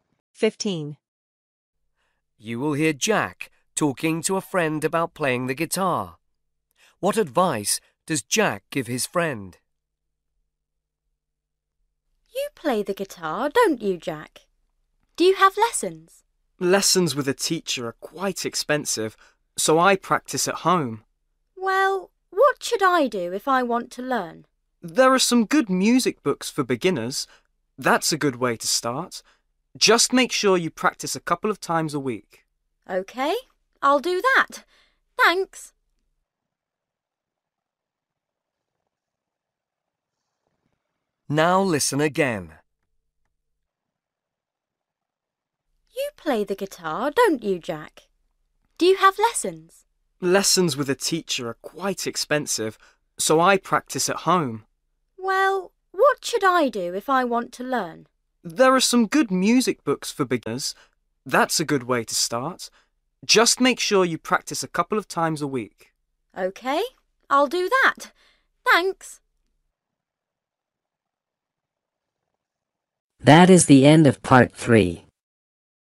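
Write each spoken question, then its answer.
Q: What advice does Jack give his friend?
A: use music books for beginners and practise at home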